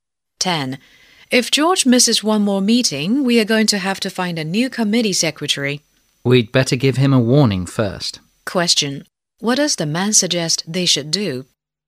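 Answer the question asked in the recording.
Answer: Give George a warning first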